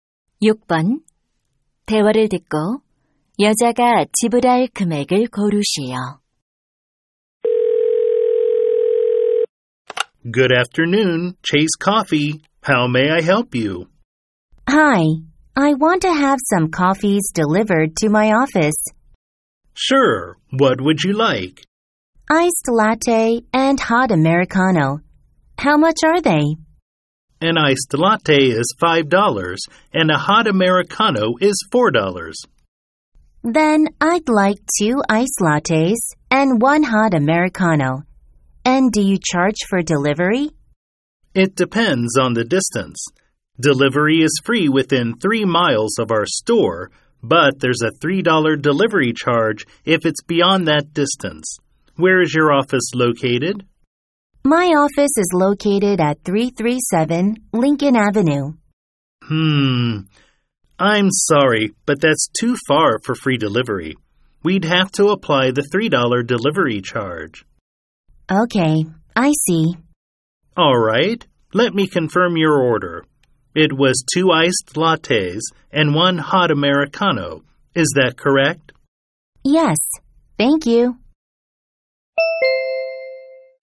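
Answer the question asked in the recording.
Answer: $17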